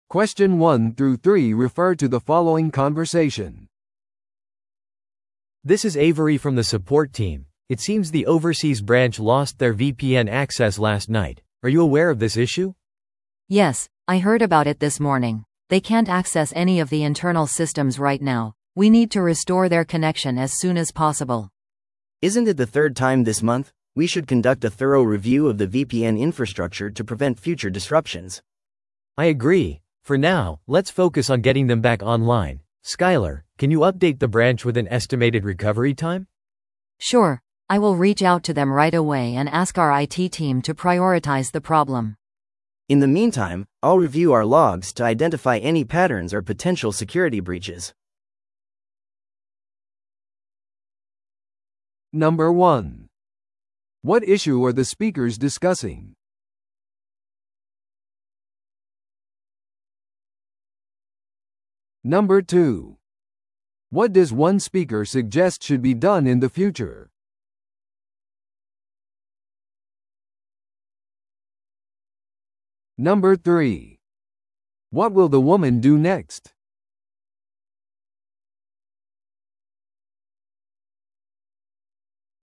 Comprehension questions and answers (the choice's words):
Listen to the audio below and answer the questions.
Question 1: What issue are the speakers discussing?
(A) VPNネットワークのセキュリティ侵害。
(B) 海外支社がVPNアクセスを失ったこと。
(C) 内部システムのメンテナンスが必要。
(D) ITチームのパフォーマンスのレビュー。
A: 海外支社がVPNアクセスを失ったこと。

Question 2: What does one speaker suggest should be done in the future?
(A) セキュリティ対策を強化する。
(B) サポートチームのトレーニングを行う。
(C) VPNインフラのレビューを実施する。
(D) ステータスアップデートの頻度を高める。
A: VPNインフラのレビューを実施する。

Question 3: What will the woman do next?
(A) ITチームとの会議を手配する。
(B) 復旧時間について支社に更新情報を伝える。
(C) サポートチームの手順を確認する。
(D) VPNアクセスログを確認する。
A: 復旧時間について支社に更新情報を伝える。

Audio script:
A: This is Avery from the support team. It seems the overseas branch lost their VPN access last night. Are you aware of this issue?
B: Yes, I heard about it this morning. They can't access any of the internal systems right now. We need to restore their connection as soon as possible.
C: Isn't it the third time this month? We should conduct a thorough review of the VPN infrastructure to prevent future disruptions.
A: I agree. For now, let's focus on getting them back online. Skyler, can you update the branch with an estimated recovery time?
B: Sure, I will reach out to them right away and ask our IT team to prioritize the problem.
C: In the meantime, I'll review our logs to identify any patterns or potential security breaches.